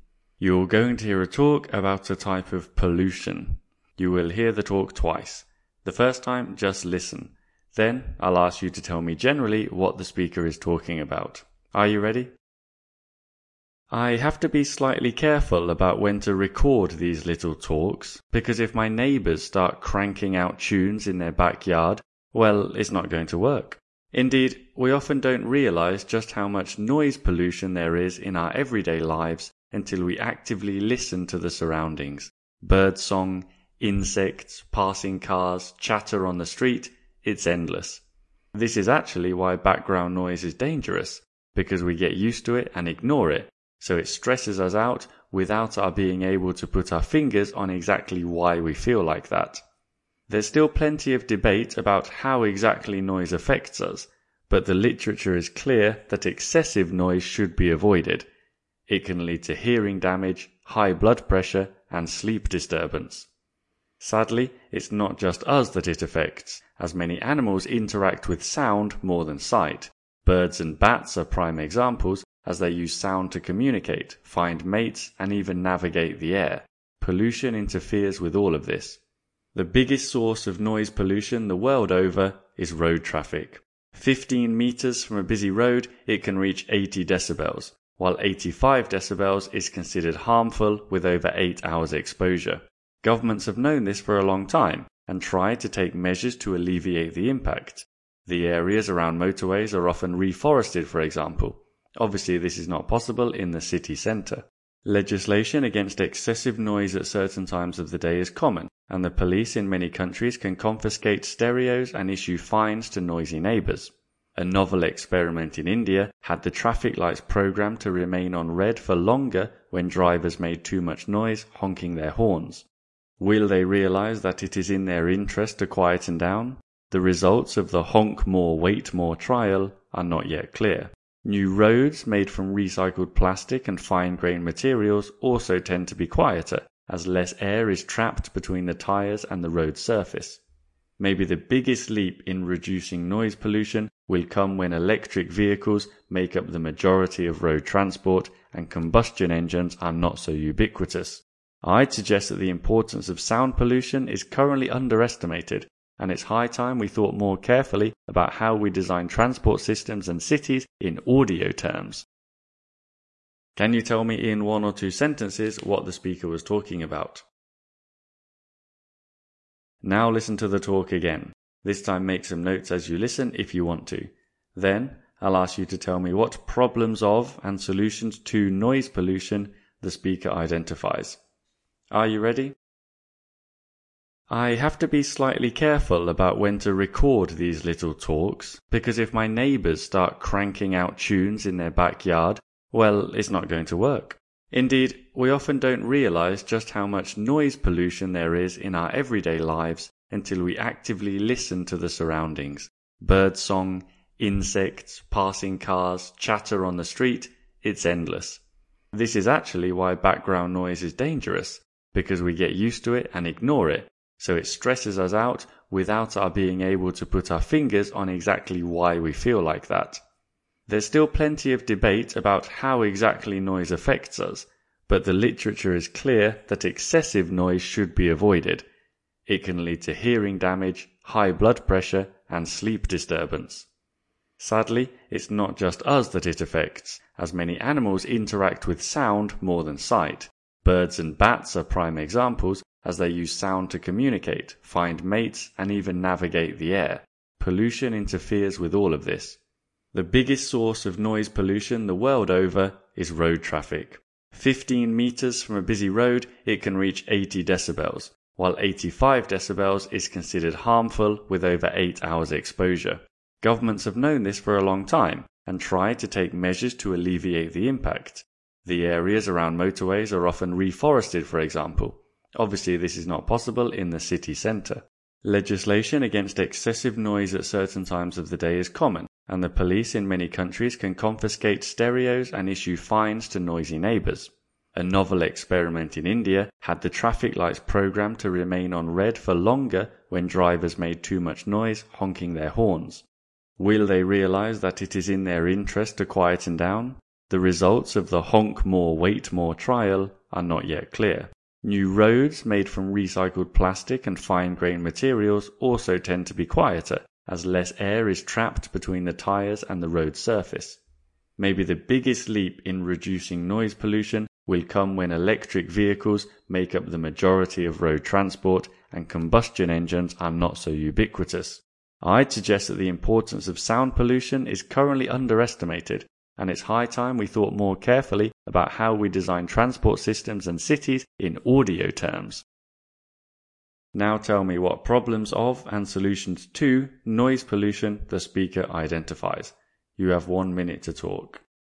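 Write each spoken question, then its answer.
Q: Can you tell me in one or two sentences what the speaker was talking about?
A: Noise pollution: how it harms people and animals, with road traffic as its main source, and how it can be reduced.

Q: Now tell me what problems of and solutions to noise pollution the speaker identifies.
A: Problems: stress, hearing damage, high blood pressure, poor sleep, and harm to animals such as birds and bats that use sound to communicate, find mates and navigate. Solutions: planting trees near motorways, laws and police fines against noise, the 'Honk More, Wait More' traffic-light trial in India, quieter road surfaces made from recycled plastic, and electric vehicles.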